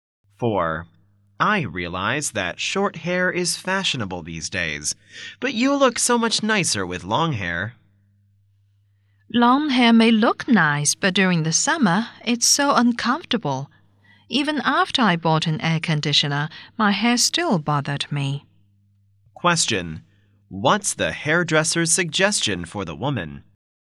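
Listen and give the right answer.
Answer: Keep her hair long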